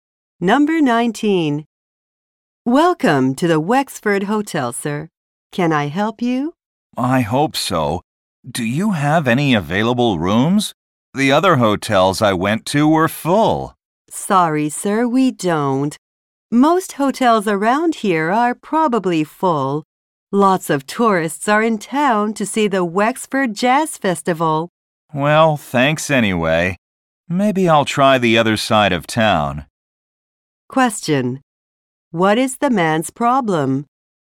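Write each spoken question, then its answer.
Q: What is the man's problem?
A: He cannot find a hotel room.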